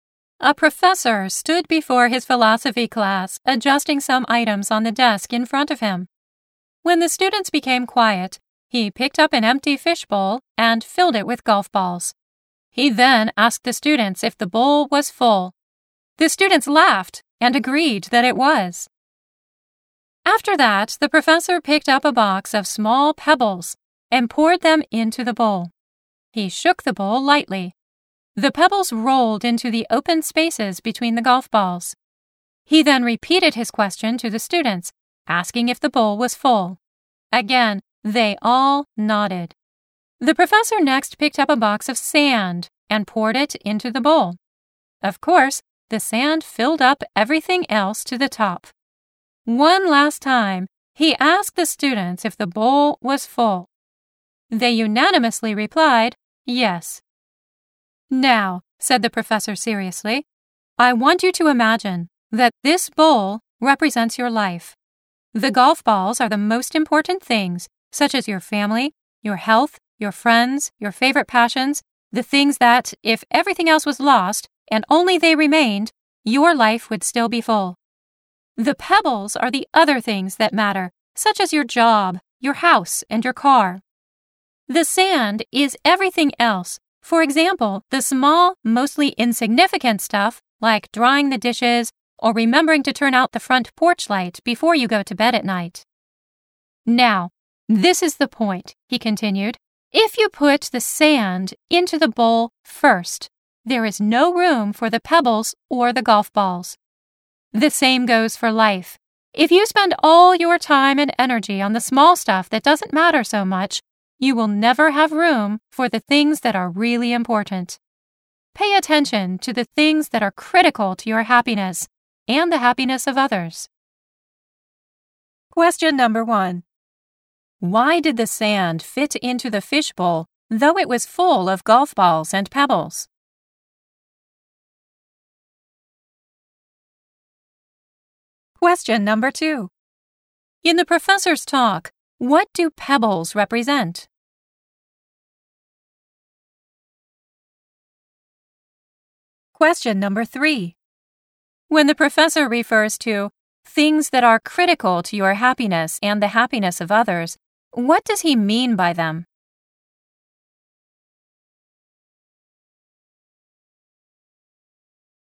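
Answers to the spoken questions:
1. Because the sand filled up the spaces between the golf balls and pebbles.
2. Other things that matter, such as your job, your house, and your car.
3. The most important things, like family, health, friends and favorite passions (the golf balls).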